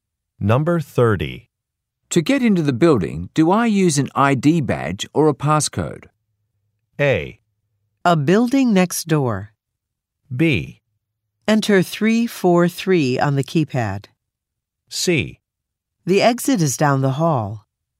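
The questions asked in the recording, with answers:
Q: To get into the building, do I use an ID badge or a passcode?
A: B: Enter 343 on the keypad.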